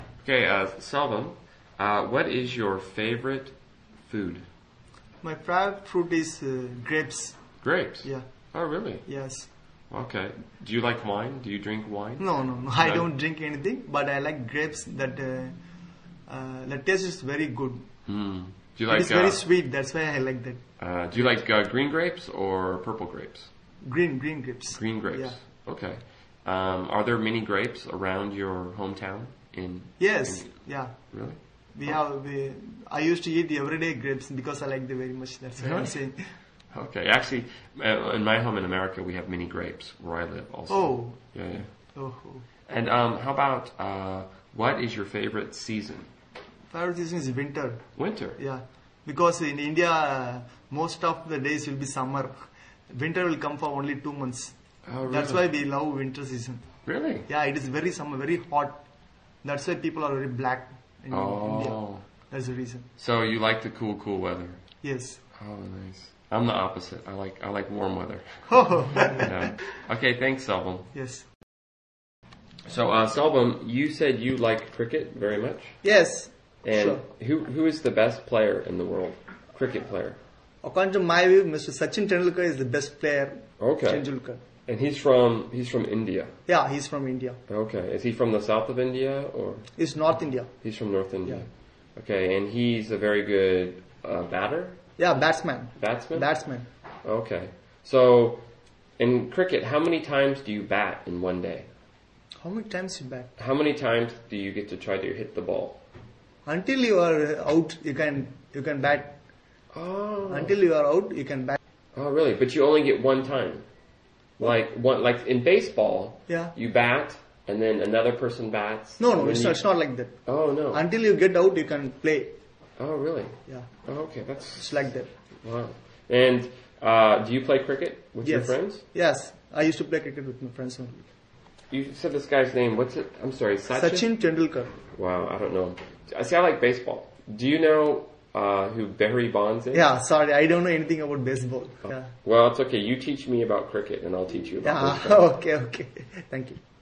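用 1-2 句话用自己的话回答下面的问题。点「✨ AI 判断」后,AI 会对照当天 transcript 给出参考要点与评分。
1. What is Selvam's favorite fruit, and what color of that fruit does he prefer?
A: Grapes; green grapes

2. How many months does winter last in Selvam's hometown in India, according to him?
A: Only two months

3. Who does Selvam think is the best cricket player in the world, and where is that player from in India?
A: Sachin Tendulkar; north India

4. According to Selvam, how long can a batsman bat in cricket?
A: Until he is out

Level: CEFRB1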